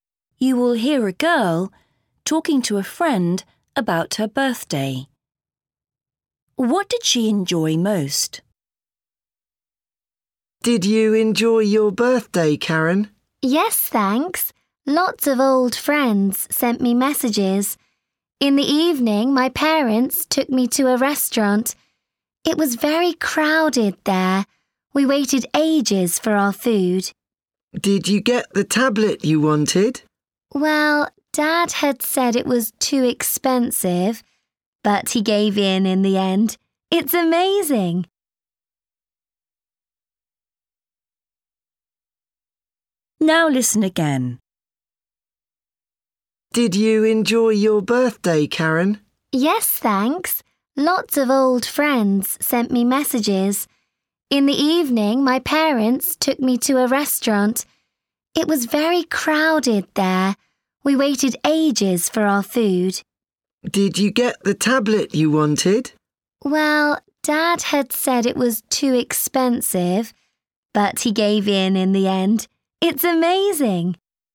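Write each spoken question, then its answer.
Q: What did she enjoy most?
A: Her present, the tablet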